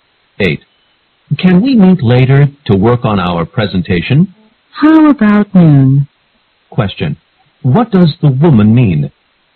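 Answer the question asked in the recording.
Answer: They can meet at noon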